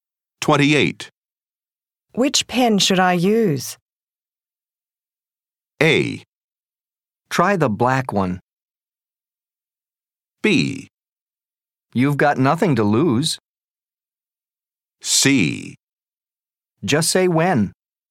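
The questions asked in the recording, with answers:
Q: Which pen should I use?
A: A: Try the black one.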